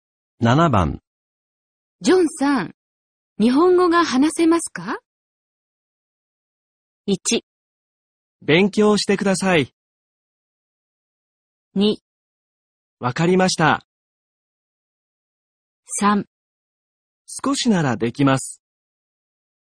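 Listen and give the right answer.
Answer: 3: 少しならできます。

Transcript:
1
勉強してください。
2
分かりました。
3
少しならできます。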